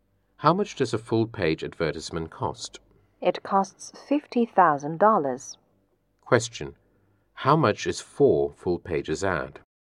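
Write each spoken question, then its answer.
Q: How much is 4 full pages ad?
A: $200,000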